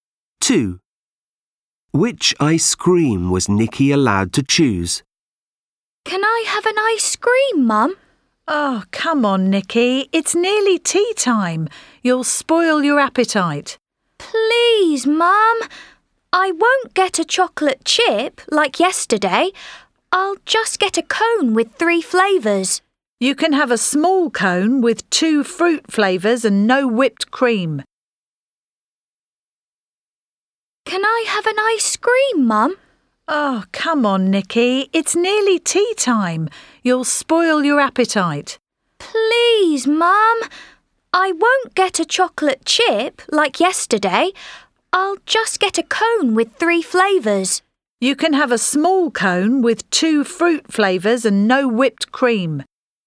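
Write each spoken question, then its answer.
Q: Which ice cream was Nikki allowed to choose?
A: A small cone with 2 fruit flavours and no whipped cream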